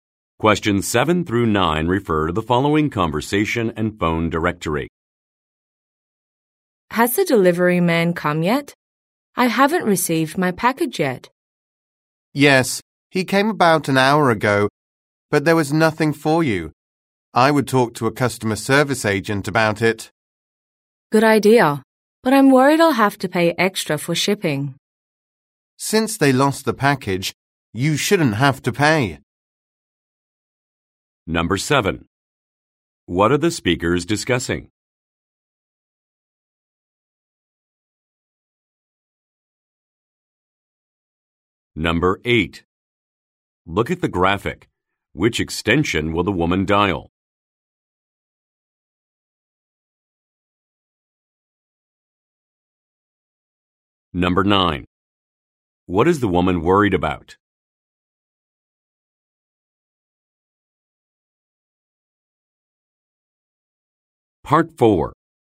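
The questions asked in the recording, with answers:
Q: What are the speakers discussing?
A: A missing package delivery.

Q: What is the woman worried about?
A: Having to pay extra for shipping.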